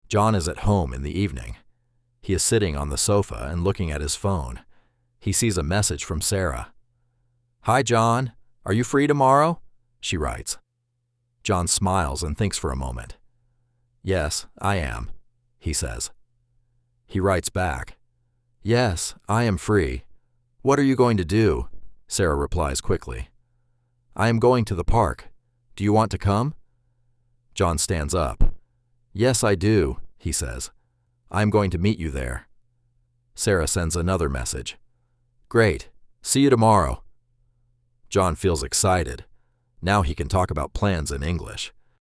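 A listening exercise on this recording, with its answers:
Responda em inglês:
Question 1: Where is John?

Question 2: Who sends the message?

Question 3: Is John free?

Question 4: What is Sarah going to do?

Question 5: What does John decide?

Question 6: How does John feel?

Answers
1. At home, on the sofa
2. Sarah
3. Yes, he is
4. She is going to the park
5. He is going to meet Sarah at the park
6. Excited

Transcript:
John is at home in the evening. He is sitting on the sofa and looking at his phone.
He sees a message from Sarah.
"Hi John! Are you free tomorrow?" she writes.
John smiles and thinks for a moment.
"Yes, I am," he says.
He writes back.
"Yes, I am free. What are you going to do?"
Sarah replies quickly.
"I am going to the park. Do you want to come?"
John stands up.
"Yes, I do," he says.
"I am going to meet you there."
Sarah sends another message.
"Great! See you tomorrow."
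John feels excited.
Now he can talk about plans in English.

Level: Inglês Básico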